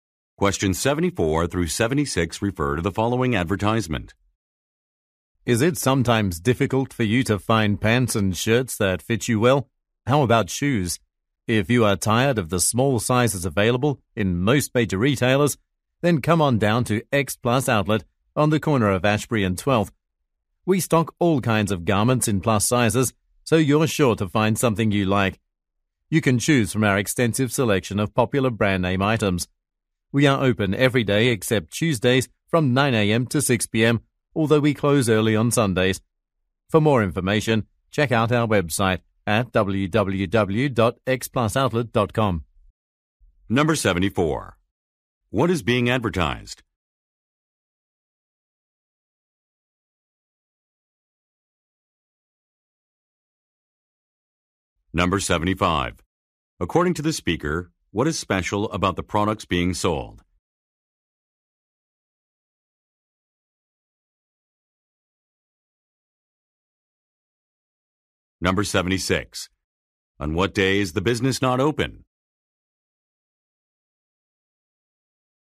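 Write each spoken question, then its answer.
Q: What is being advertised?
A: A plus-size clothing store (X Plus Outlet)

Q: According to the speaker, what is special about the products being sold?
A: They are in plus sizes

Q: On what day is the business not open?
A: Tuesday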